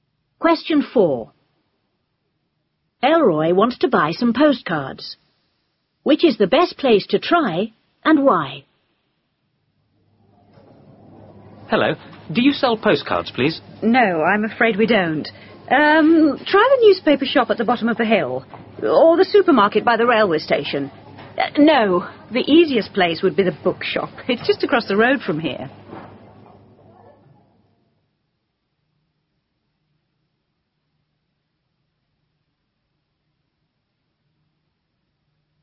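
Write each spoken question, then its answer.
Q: Which is the best place to try and why?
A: The bookshop, because it is just across the road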